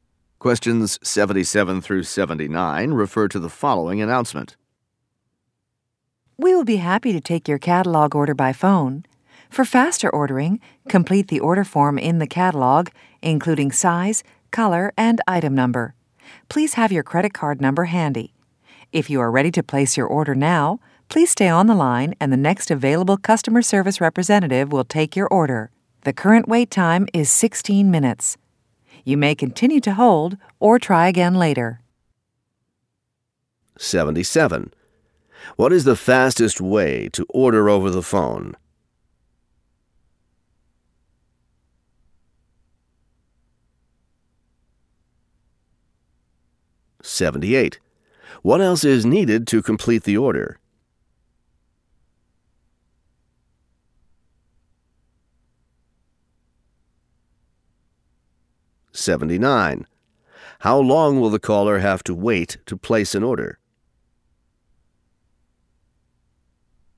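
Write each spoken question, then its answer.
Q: What is the fastest way to order over the phone?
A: Complete the catalog order form first

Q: What else is needed to complete the order?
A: A credit card number

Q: How long will the caller have to wait to place an order?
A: 16 minutes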